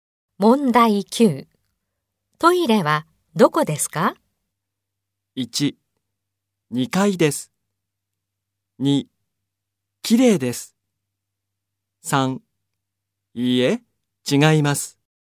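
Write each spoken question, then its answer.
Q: トイレはどこですか?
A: 1: 2階です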